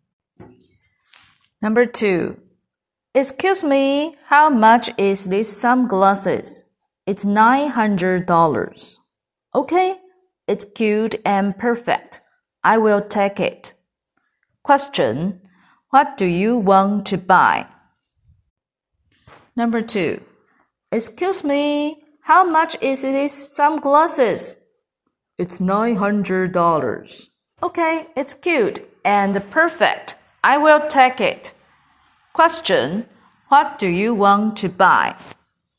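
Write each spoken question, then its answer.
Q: what do you want to buy?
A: Sunglasses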